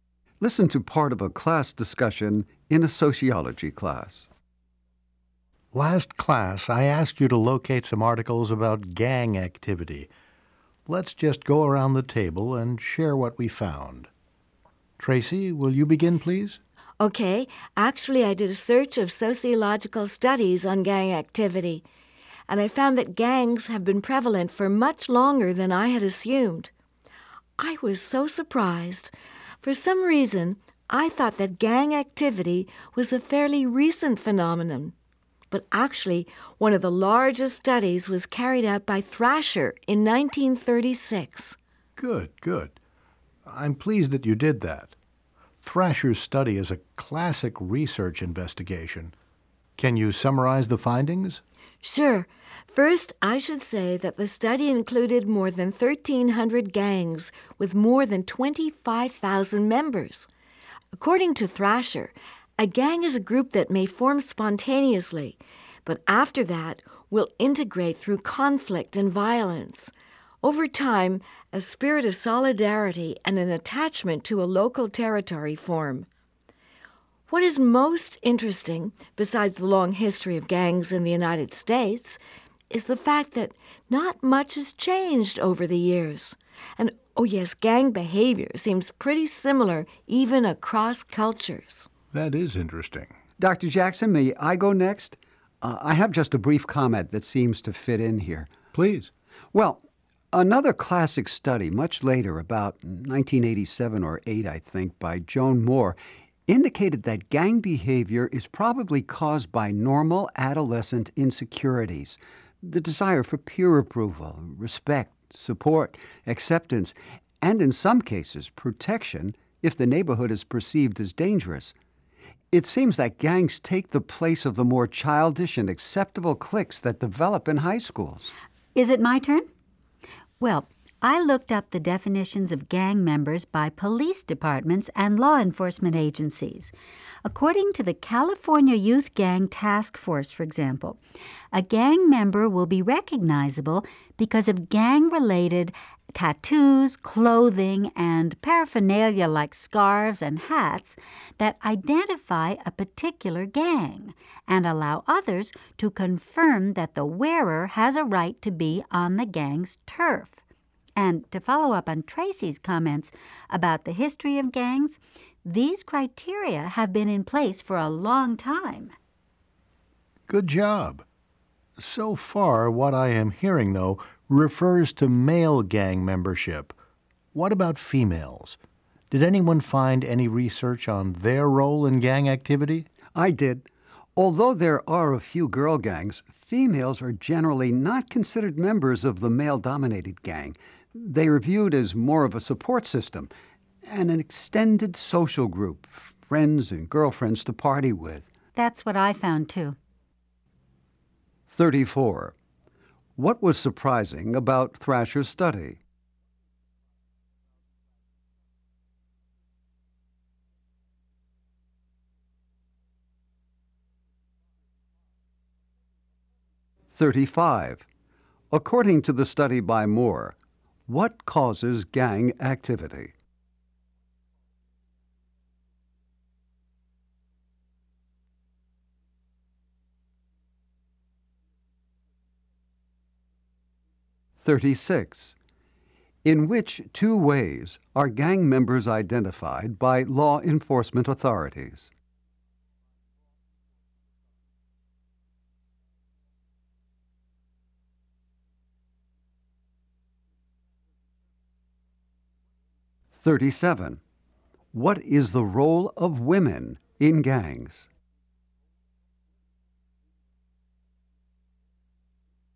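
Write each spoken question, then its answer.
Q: What was surprising about Thrasher's study?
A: Gangs have existed for a long time and have changed very little

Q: According to the study by Moore, what causes gang activity?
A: Normal adolescent insecurities, such as the desire for peer approval

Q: In which two ways are gang members identified by law enforcement authorities?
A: By gang-related tattoos and by clothing or paraphernalia

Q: What is the role of women in gangs?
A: They are a support system and extended social group, not members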